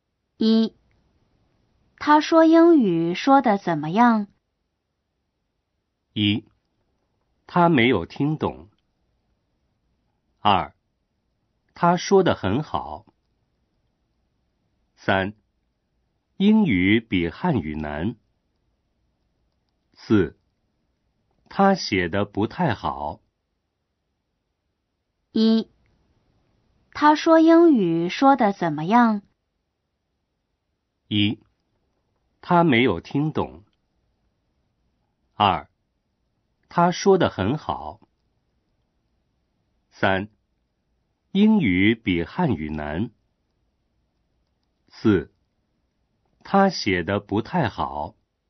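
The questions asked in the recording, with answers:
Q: 他说英语说得怎么样?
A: 二: 他说得很好。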